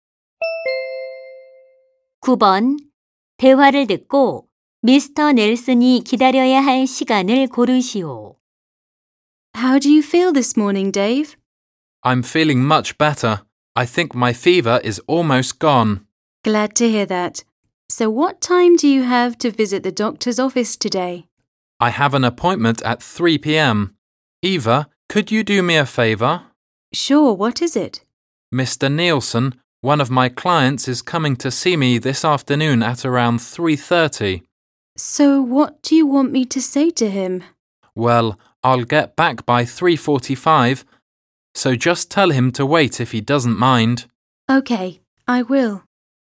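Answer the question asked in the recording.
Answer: 15분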